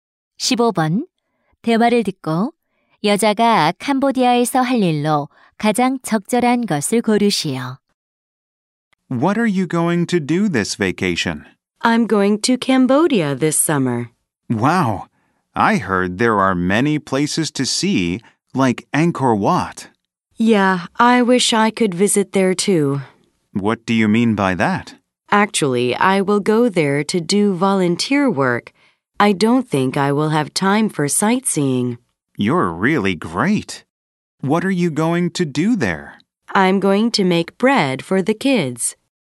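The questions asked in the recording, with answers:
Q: 대화를 듣고 여자가 캄보디아에서 할 일로 가장 적절한 것을 고르시오.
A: 아이들을 위해 빵 만들기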